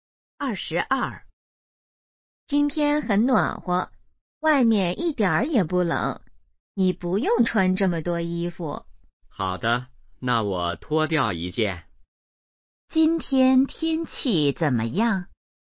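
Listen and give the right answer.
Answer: 很暖和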